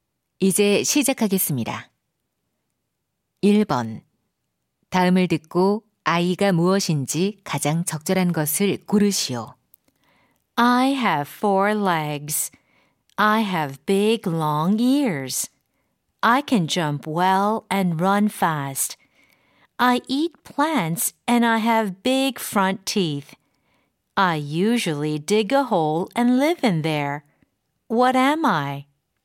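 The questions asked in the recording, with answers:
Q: 다음을 듣고 아이가 무엇인지 가장 적절한 것을 고르시오.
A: 토끼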